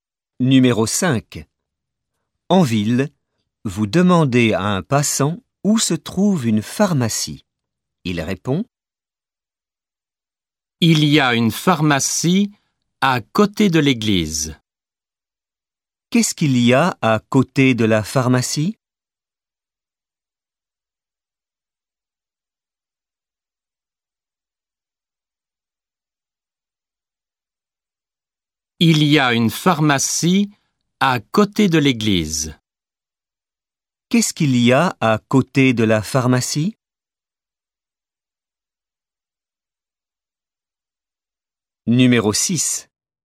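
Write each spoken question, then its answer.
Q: Qu'est-ce qu'il y a à côté de la pharmacie ?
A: L'église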